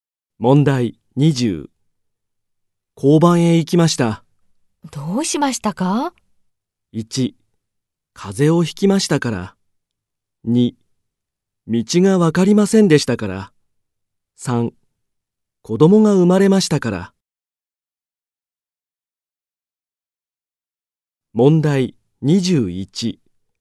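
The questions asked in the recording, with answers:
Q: 交番へ行きました。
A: 2: 道がわかりませんでしたから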